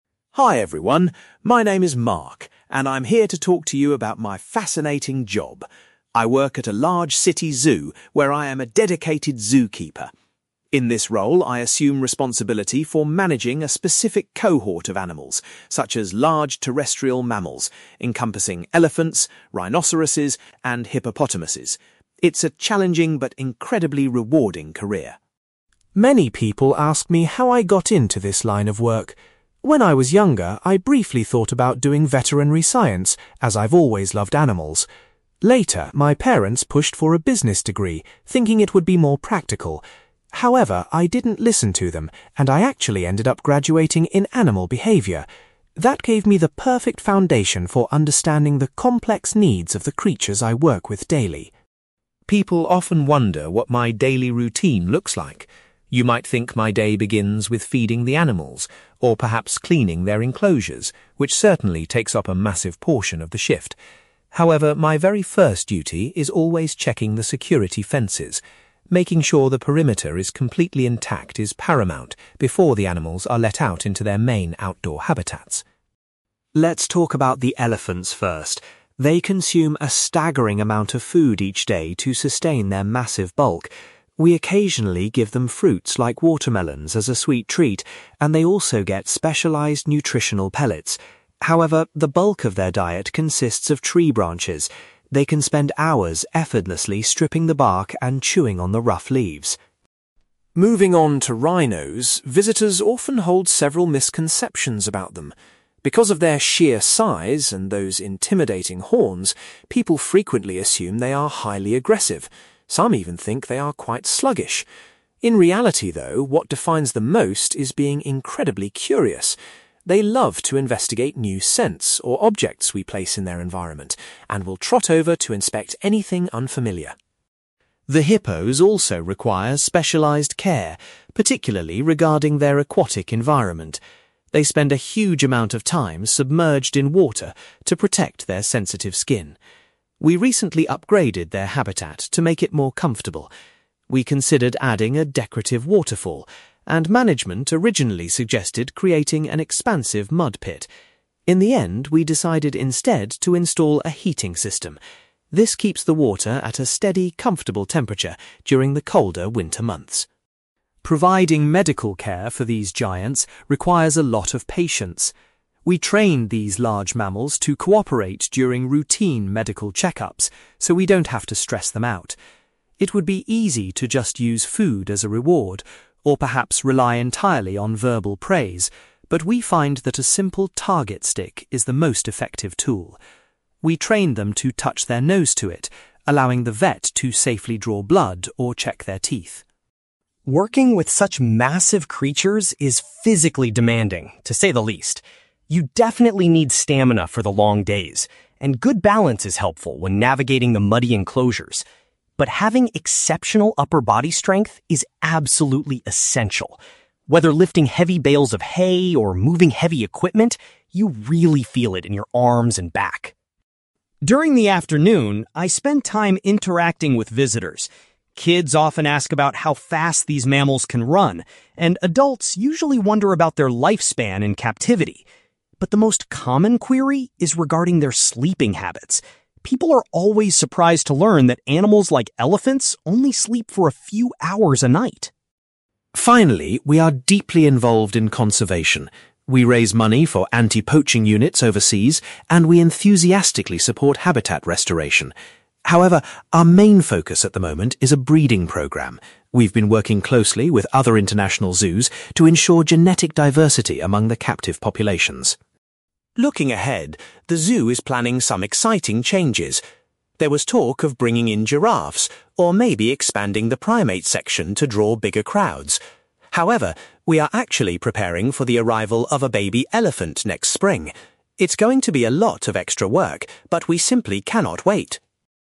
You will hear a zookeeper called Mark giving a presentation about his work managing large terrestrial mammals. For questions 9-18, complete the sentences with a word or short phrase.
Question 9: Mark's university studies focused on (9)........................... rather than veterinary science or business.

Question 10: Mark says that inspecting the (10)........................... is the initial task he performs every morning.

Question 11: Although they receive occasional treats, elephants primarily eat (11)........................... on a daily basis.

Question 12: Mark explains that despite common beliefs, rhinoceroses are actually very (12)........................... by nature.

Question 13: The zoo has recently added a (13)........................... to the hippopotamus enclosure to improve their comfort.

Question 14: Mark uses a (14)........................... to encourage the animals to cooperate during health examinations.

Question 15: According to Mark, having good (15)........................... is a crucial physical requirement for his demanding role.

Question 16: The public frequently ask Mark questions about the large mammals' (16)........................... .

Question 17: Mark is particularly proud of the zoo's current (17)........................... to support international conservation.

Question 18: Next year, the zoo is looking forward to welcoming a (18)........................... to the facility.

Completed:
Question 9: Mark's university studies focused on animal behaviour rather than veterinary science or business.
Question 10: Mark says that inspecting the security fences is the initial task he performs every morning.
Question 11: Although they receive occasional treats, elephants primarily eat tree branches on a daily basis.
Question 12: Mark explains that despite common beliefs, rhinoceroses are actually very curious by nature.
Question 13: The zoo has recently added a heating system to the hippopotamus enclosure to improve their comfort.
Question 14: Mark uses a target stick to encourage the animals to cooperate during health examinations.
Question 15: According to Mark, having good upper-body strength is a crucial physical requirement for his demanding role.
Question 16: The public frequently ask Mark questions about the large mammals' sleeping habits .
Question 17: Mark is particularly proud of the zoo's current breeding programme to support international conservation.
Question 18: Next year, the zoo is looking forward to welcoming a baby elephant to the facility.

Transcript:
Mark: Hi everyone, my name is Mark, and I'm here to talk to you about my fascinating job. I work at a large city zoo where I am a dedicated zookeeper. In this role, I assume responsibility for managing a specific cohort of animals, such as large terrestrial mammals encompassing elephants, rhinoceroses, and hippopotamuses. It's a challenging but incredibly rewarding career.
Many people ask me how I got into this line of work. When I was younger, I briefly thought about doing veterinary science, as I've always loved animals. Later, my parents pushed for a business degree, thinking it would be more practical. However, I didn't listen to them, and I actually ended up graduating in animal behaviour. That gave me the perfect foundation for understanding the complex needs of the creatures I work with daily.
People often wonder what my daily routine looks like. You might think my day begins with feeding the animals, or perhaps cleaning their enclosures—which certainly takes up a massive portion of the shift. However, my very first duty is always checking the security fences. Making sure the perimeter is completely intact is paramount before the animals are let out into their main outdoor habitats.
Let's talk about the elephants first. They consume a staggering amount of food each day to sustain their massive bulk. We occasionally give them fruits like watermelons as a sweet treat, and they also get specialized nutritional pellets. However, the bulk of their diet consists of tree branches. They can spend hours effortlessly stripping the bark and chewing on the rough leaves.
Moving on to rhinos, visitors often hold several misconceptions about them. Because of their sheer size and those intimidating horns, people frequently assume they are highly aggressive. Some even think they are quite sluggish. In reality, though, what defines them most is being incredibly curious. They love to investigate new scents or objects we place in their environment and will trot over to inspect anything unfamiliar.
The hippos also require specialized care, particularly regarding their aquatic environment. They spend a huge amount of time submerged in water to protect their sensitive skin. We recently upgraded their habitat to make it more comfortable. We considered adding a decorative waterfall, and management originally suggested creating an expansive mud pit. In the end, we decided instead to install a heating system. This keeps the water at a steady, comfortable temperature during the colder winter months.
Providing medical care for these giants requires a lot of patience. We train these large mammals to cooperate during routine medical check-ups so we don't have to stress them out. It would be easy to just use food as a reward, or perhaps rely entirely on verbal praise, but we find that a simple target stick is the most effective tool. We train them to touch their nose to it, allowing the vet to safely draw blood or check their teeth.
Working with such massive creatures is physically demanding, to say the least. You definitely need stamina for the long days, and good balance is helpful when navigating the muddy enclosures. But having exceptional upper-body strength is absolutely essential. Whether lifting heavy bales of hay or moving heavy equipment, you really feel it in your arms and back.
During the afternoon, I spend time interacting with visitors. Kids often ask about how fast these mammals can run, and adults usually wonder about their lifespan in captivity. But the most common query is regarding their sleeping habits. People are always surprised to learn that animals like elephants only sleep for a few hours a night!
Finally, we are deeply involved in conservation. We raise money for anti-poaching units overseas, and we enthusiastically support habitat restoration. However, our main focus at the moment is a breeding programme. We've been working closely with other international zoos to ensure genetic diversity among the captive populations.
Looking ahead, the zoo is planning some exciting changes. There was talk of bringing in giraffes, or maybe expanding the primate section to draw bigger crowds. However, we are actually preparing for the arrival of a baby elephant next spring. It's going to be a lot of extra work, but we simply cannot wait!

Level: B2